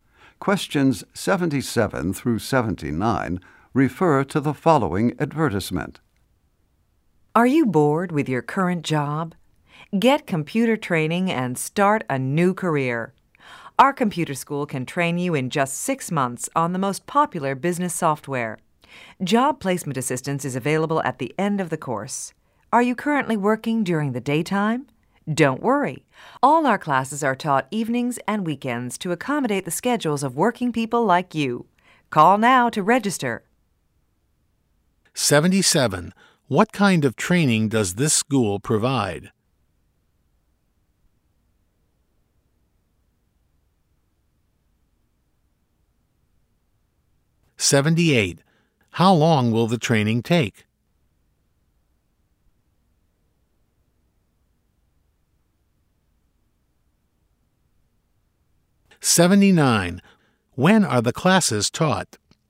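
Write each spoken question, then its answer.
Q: What kind of training does this school provide?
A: Computer training

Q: How long will the training take?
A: 6 months

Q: When are the classes taught?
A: Evenings and weekends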